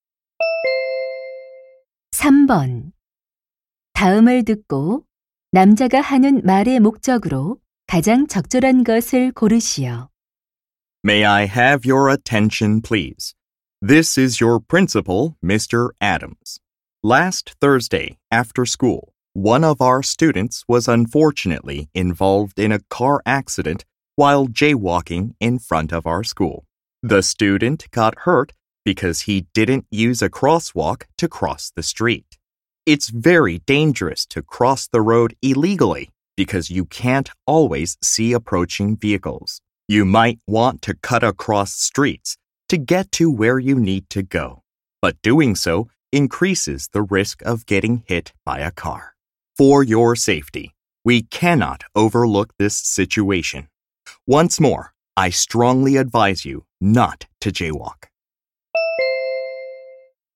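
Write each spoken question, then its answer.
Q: 다음을 듣고 남자가 하는 말의 목적으로 가장 적절한 것을 고르시오.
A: 무단횡단을 하지 말 것을 당부하려고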